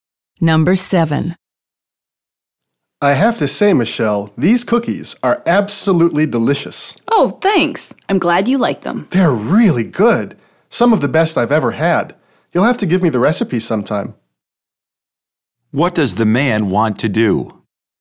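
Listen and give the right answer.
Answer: Get the cookie recipe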